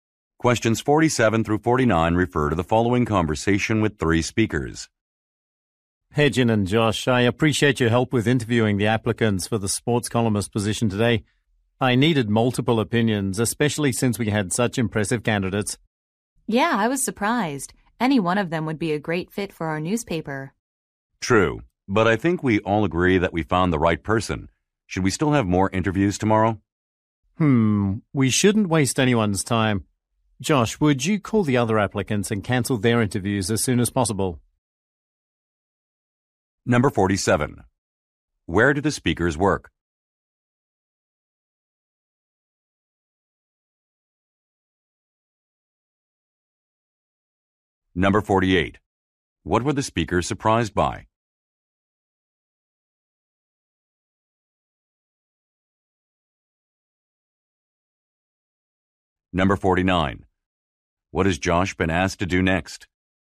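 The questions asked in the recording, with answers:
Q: Where do the speakers work?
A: At a newspaper

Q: What were the speakers surprised by?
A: How impressive the candidates were

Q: What has Josh been asked to do next?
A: Call the other applicants to cancel their interviews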